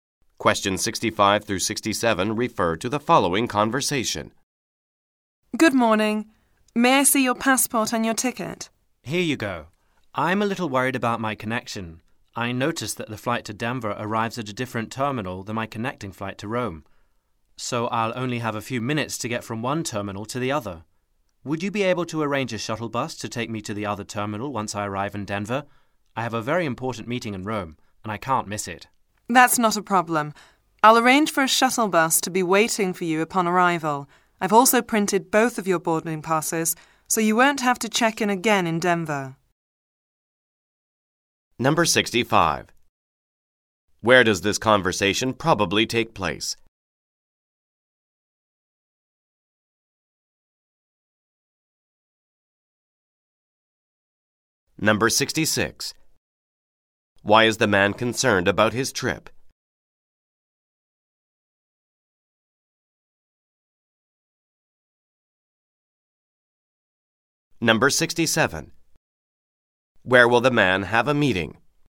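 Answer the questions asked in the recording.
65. At an airport check-in counter
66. He has little time to change terminals for his connection
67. In Rome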